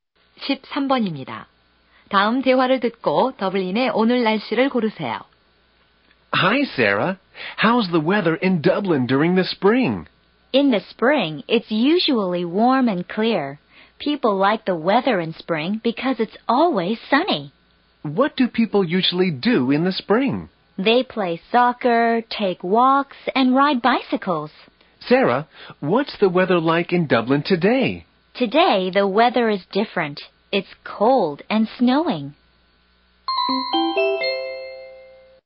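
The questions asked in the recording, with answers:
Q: 다음 대화를 듣고 더블린의 오늘 날씨를 고르세요.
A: 춥고 눈이 옴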